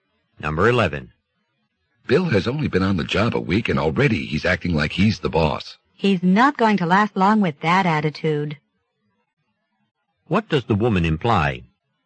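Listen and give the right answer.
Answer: Bill will probably lose his job soon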